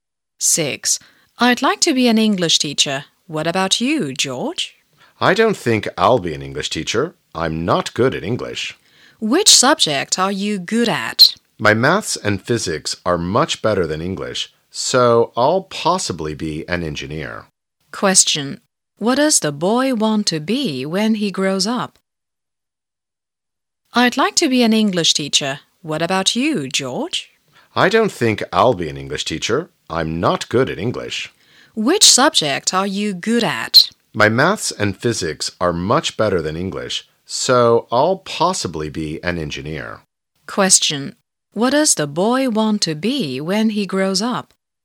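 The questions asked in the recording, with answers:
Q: Question. What does the boy want to be when he grows up?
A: An engineer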